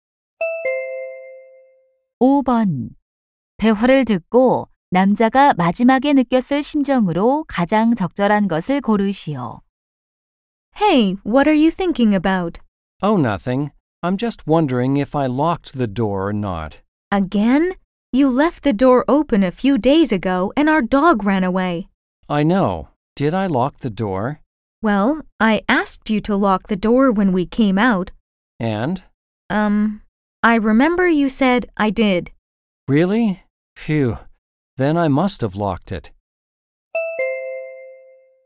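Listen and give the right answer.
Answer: 안도함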